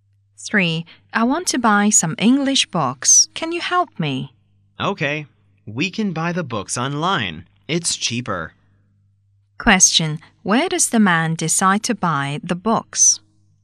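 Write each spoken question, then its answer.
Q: Where does the man decide to buy the books?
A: Online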